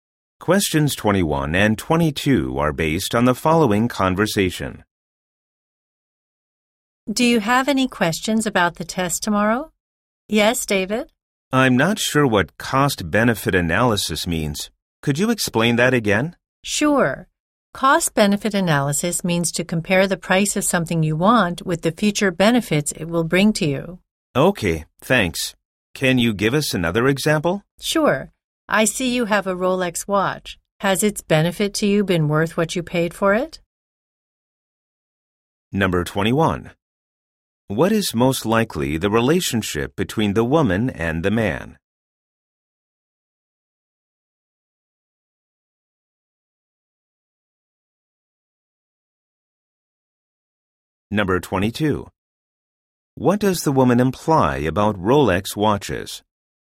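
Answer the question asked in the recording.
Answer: Teacher and student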